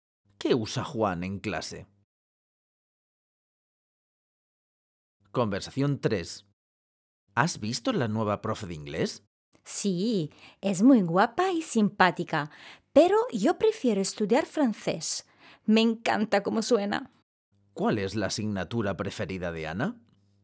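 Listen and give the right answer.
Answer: francés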